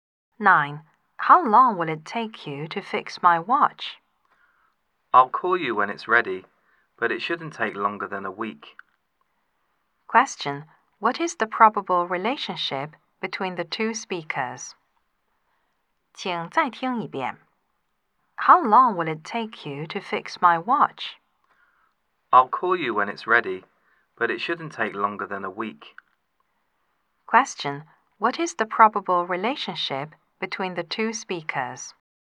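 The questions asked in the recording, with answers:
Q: What is the probable relationship between the two speakers?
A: Customer and watch repairer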